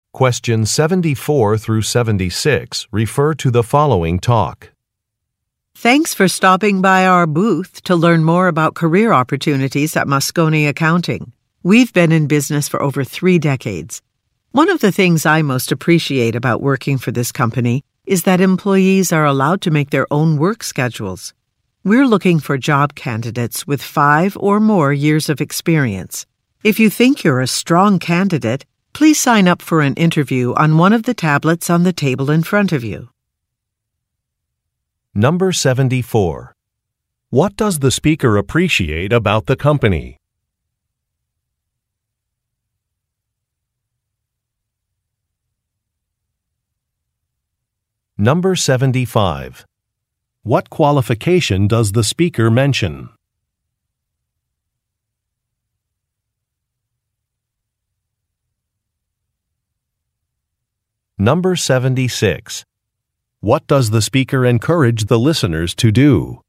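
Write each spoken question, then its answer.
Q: What does the speaker appreciate about the company?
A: Employees are allowed to make their own work schedules.

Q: What qualification does the speaker mention?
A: 5 or more years of experience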